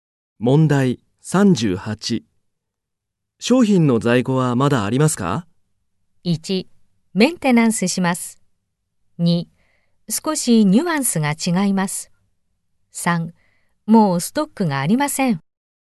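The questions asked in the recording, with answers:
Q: 商品の在庫はまだありますか?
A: 3: もうストックがありません。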